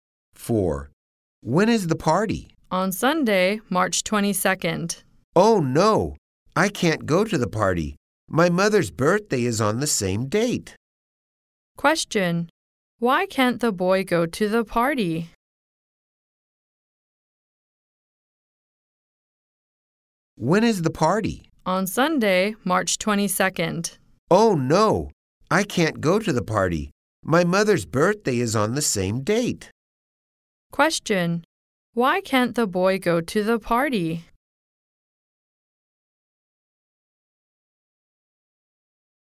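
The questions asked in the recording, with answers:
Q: Why can't the boy go to the party?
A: His mother's birthday is on the same date.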